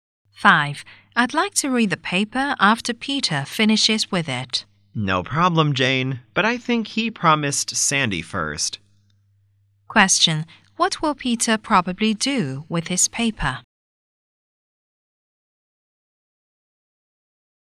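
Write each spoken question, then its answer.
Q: Question, what will Peter probably do with his paper?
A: Give it to Sandy first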